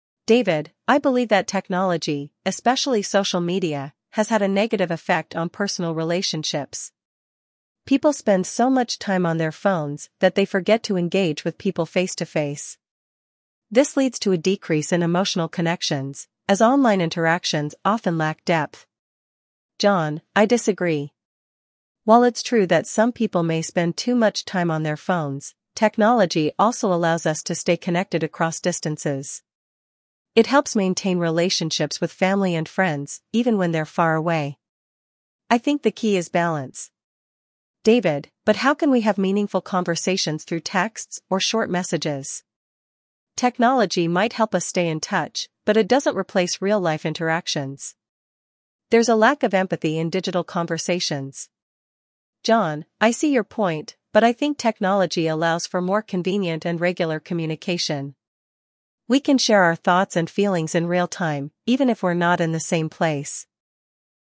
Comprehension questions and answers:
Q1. What is Speaker 1's viewpoint on technology's impact on relationships?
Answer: It has a negative impact on relationships

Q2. What is Speaker 2's main point of view?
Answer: Technology helps people stay connected

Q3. What does Speaker 1 believe is missing in digital interactions?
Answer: Empathy

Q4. What does Speaker 1 suggest about texting and messaging?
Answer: It doesn't allow meaningful conversations

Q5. What is Speaker 2's conclusion about using technology?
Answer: It is a helpful tool for staying connected if used in balance

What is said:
David: "I believe that technology, especially social media, has had a negative effect on personal relationships. People spend so much time on their phones that they forget to engage with people face-to-face. This leads to a decrease in emotional connections, as online interactions often lack depth."
John: "I disagree. While it's true that some people may spend too much time on their phones, technology also allows us to stay connected across distances. It helps maintain relationships with family and friends, even when they're far away. I think the key is balance."
David: "But how can we have meaningful conversations through texts or short messages? Technology might help us stay in touch, but it doesn't replace real-life interactions. There's a lack of empathy in digital conversations."
John: "I see your point, but I think technology allows for more convenient and regular communication. We can share our thoughts and feelings in real-time, even if we're not in the same place."